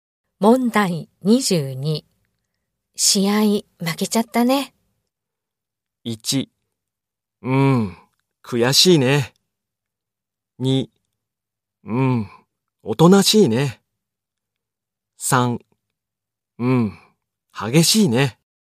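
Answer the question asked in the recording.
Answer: 1: 悔しいね。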